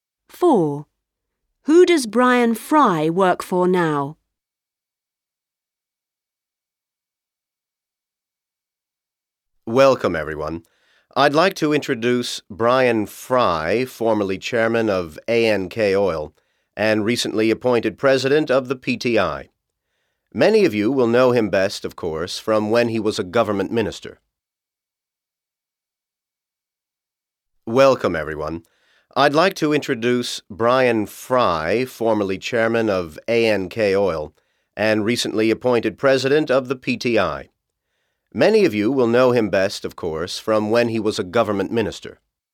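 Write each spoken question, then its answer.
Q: Who does Brian Fry work for now?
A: The PTI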